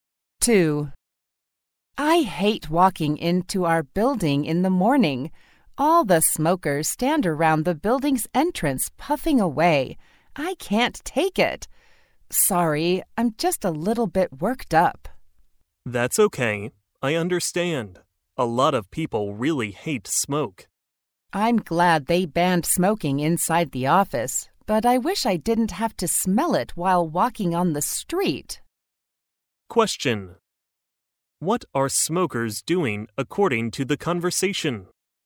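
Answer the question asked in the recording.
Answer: Standing around the building's entrance smoking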